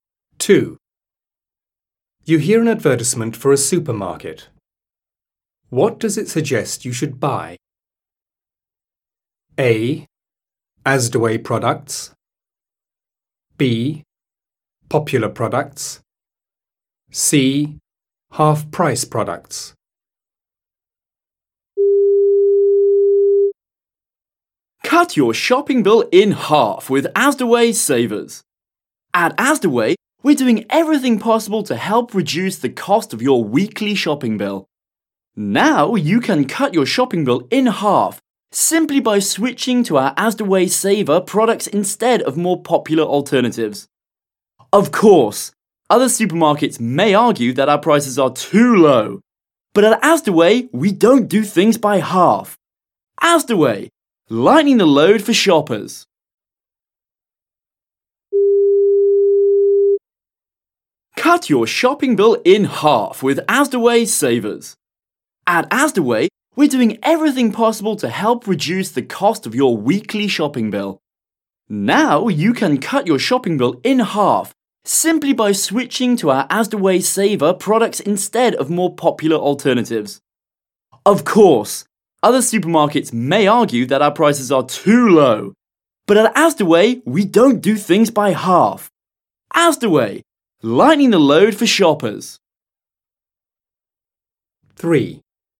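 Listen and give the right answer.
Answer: A: Asdaway products.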